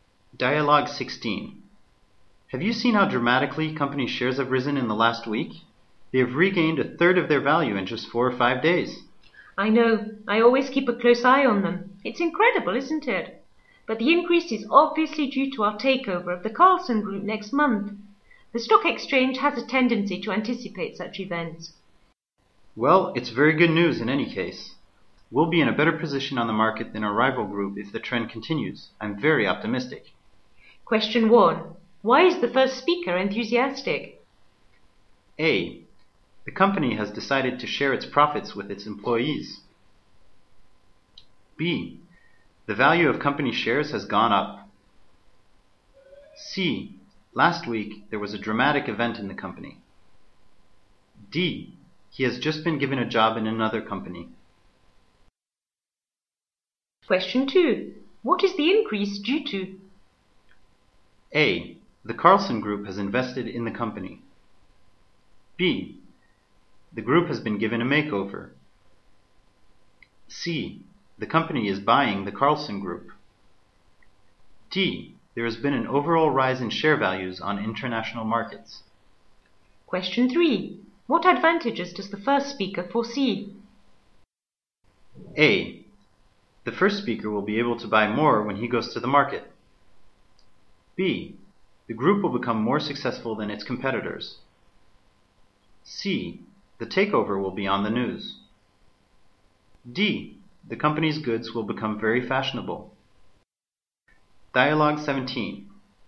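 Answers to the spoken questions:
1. B: The value of company shares has gone up.
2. C: The company is buying the Carlson Group.
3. B: The group will become more successful than its competitors.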